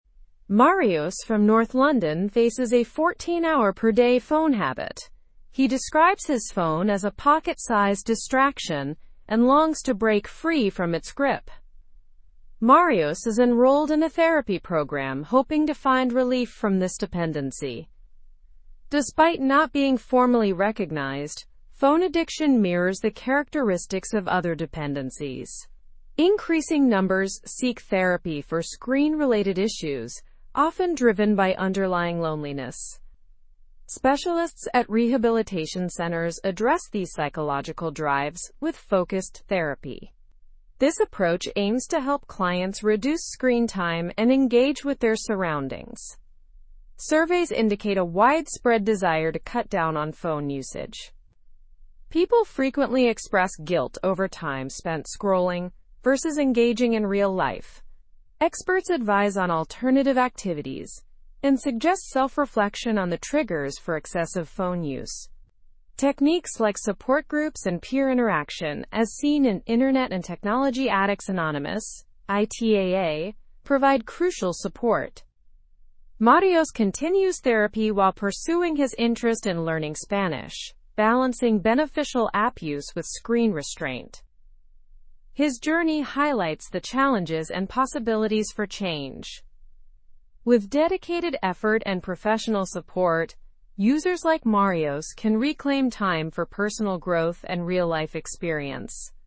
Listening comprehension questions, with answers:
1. What problem does Marios face with his phone?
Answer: Marios has a 14-hour-per-day phone habit.

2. How does Marios describe his phone?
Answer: He describes it as a pocket-sized distraction.

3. What type of program is Marios enrolled in to help with his dependency?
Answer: He is enrolled in a therapy program.

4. Why do some people seek therapy for screen-related issues?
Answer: They often seek therapy due to underlying loneliness.

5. What strategies are suggested to help reduce phone usage?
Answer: Support groups and peer interaction are suggested techniques.

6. What activity is Marios interested in as he continues therapy?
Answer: He is interested in learning Spanish.

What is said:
Marios from north London faces a 14-hour-per-day phone habit. He describes his phone as a pocket-sized distraction and longs to break free from its grip. Marios is enrolled in a therapy program hoping to find relief from this dependency.
Despite not being formally recognized, phone addiction mirrors the characteristics of other dependencies. Increasing numbers seek therapy for screen-related issues, often driven by underlying loneliness. Specialists at rehabilitation centers address these psychological drives with focused therapy. This approach aims to help clients reduce screen time and engage with their surroundings.
Surveys indicate a widespread desire to cut down on phone usage. People frequently express guilt over time spent scrolling versus engaging in real life. Experts advise on alternative activities and suggest self-reflection on the triggers for excessive phone use. Techniques like support groups and peer interaction, as seen in Internet and Technology Addicts Anonymous (ITAA), provide crucial support.
Marios continues therapy while pursuing his interest in learning Spanish, balancing beneficial app use with screen restraint. His journey highlights the challenges and possibilities for change. With dedicated effort and professional support, users like Marios can reclaim time for personal growth and real-life experience.

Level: Level 3